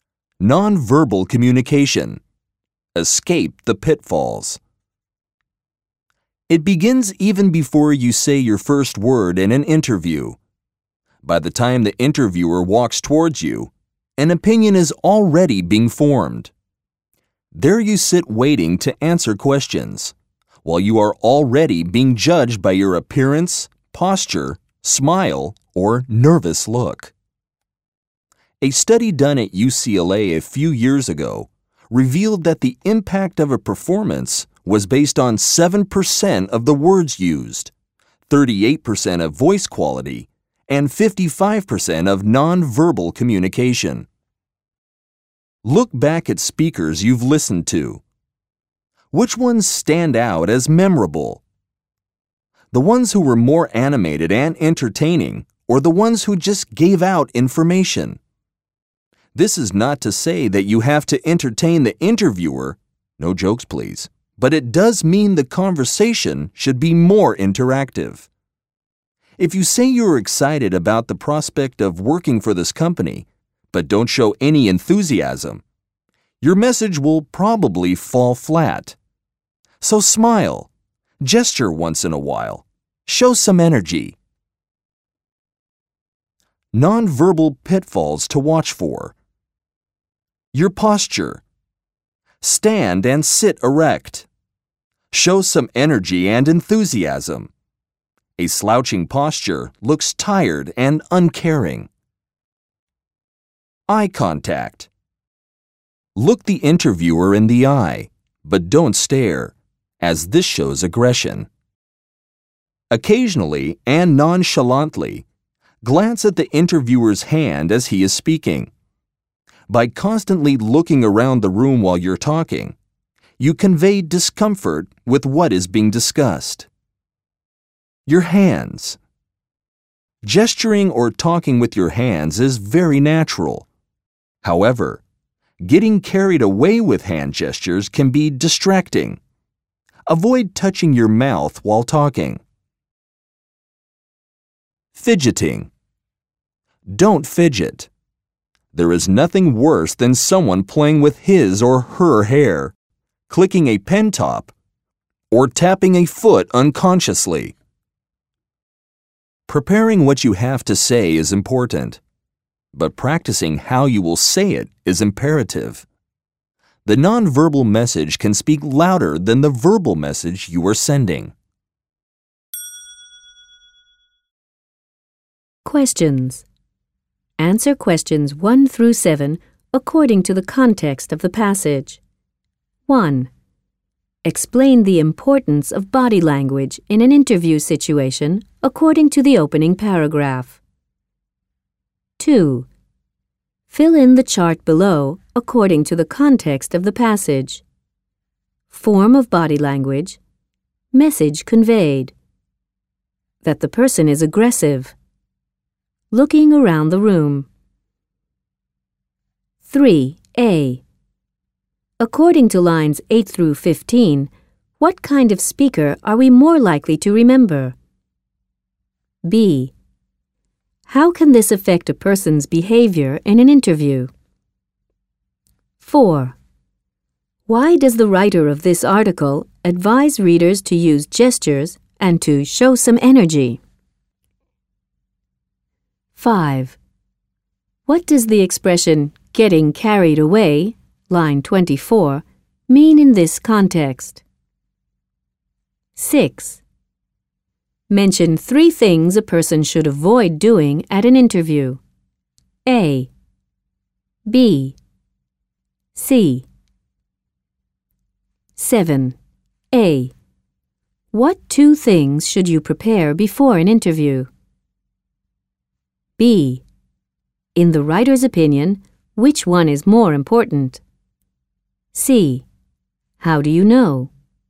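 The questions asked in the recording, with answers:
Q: Explain the importance of body language in an interview situation according to the opening paragraph.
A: You are judged by your appearance, posture and smile before you say a word; an opinion is formed early

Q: According to lines 8 through 15, what kind of speaker are we more likely to remember?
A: Ones who are more animated and entertaining

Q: How can this affect a person's behavior in an interview?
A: The conversation should be more interactive

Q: Why does the writer of this article advise readers to use gestures and to show some energy?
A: Without showing enthusiasm, your message will fall flat

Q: What does the expression "getting carried away," line 24, mean in this context?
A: Overdoing it (using too many hand gestures)

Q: Mention 3 things a person should avoid doing at an interview.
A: Slouching, staring, fidgeting (also touching your mouth)

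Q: What 2 things should you prepare before an interview?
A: What you will say and how you will say it

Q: In the writer's opinion, which one is more important?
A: How you will say it

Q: How do you know?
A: Preparing what to say is important, but practicing how to say it is imperative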